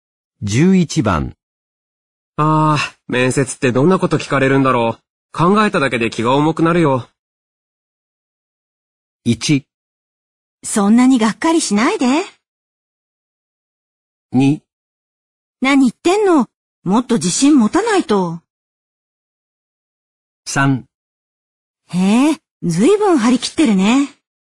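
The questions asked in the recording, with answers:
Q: ああ、面接ってどんなこと聞かれるんだろう。考えただけで気が重くなるよ。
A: 2: 何言ってんの?もっと自信持たないと。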